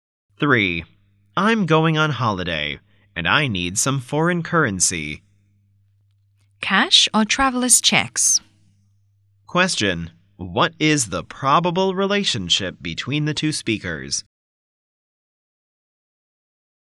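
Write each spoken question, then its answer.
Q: Question, what is the probable relationship between the two speakers?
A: Bank clerk and customer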